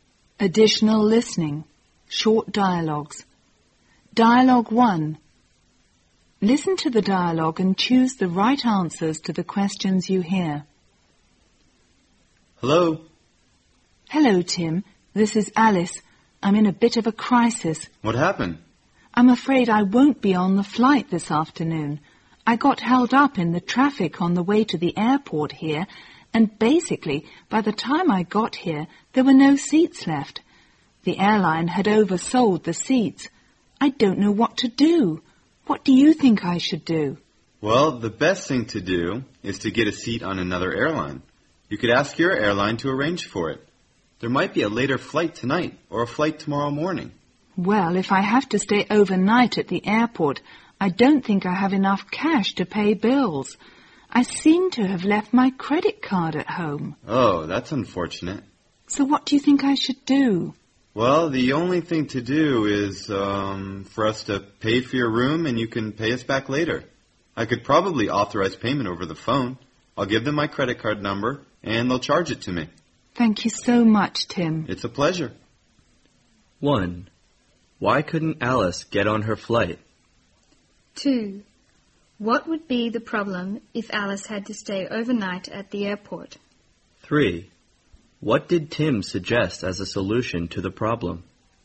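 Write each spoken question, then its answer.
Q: Why couldn't Alice get on her flight?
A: She was held up in traffic and the airline had oversold the seats, so none were left

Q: What would be the problem if Alice had to stay overnight at the airport?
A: She didn't have enough cash and had left her credit card at home

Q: What did Tim suggest as a solution to the problem?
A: He would pay for her room by credit card over the phone and she could pay him back later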